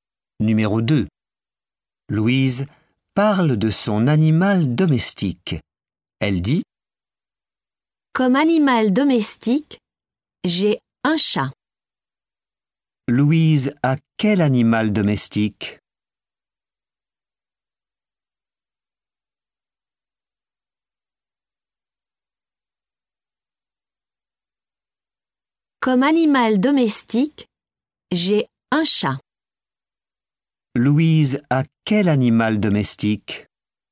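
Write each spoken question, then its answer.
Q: Louise a quel animal domestique?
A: un chat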